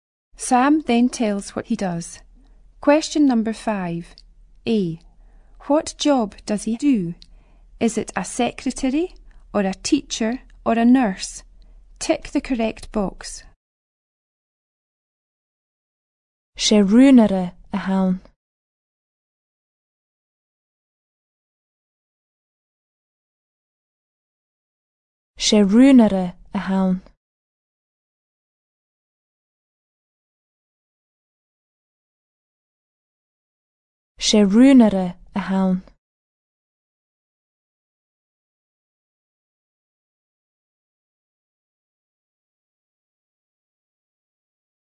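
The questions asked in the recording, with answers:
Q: A. What job does he do?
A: Secretary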